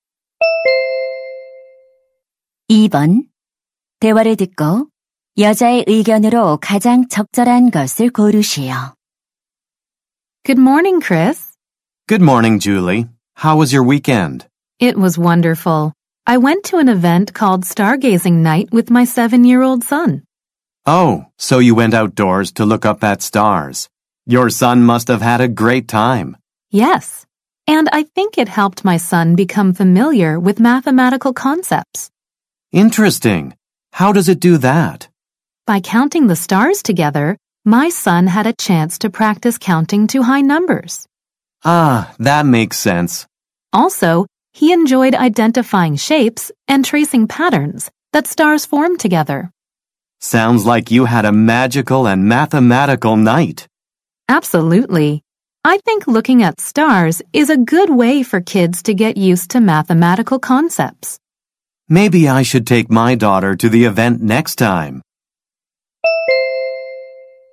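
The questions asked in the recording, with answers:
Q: 대화를 듣고 여자의 의견으로 가장 적절한 것을 고르시오.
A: 별을 관찰하는 것은 아이들이 수학 개념에 익숙해지는 데 도움이 된다.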